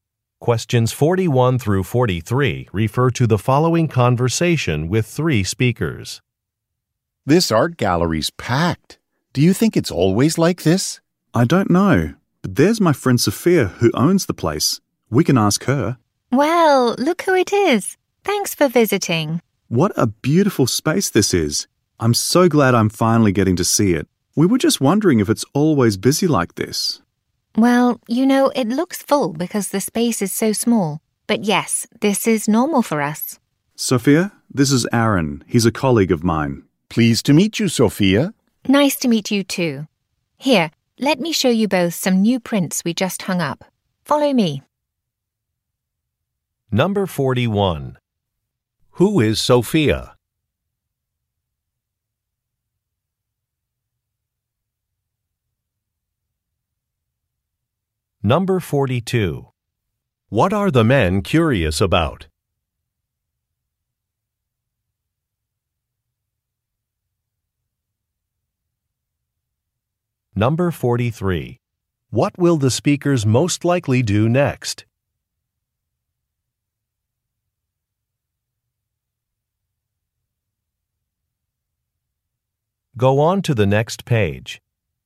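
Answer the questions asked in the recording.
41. The art gallery owner
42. Whether the gallery is always busy
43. Look at some new prints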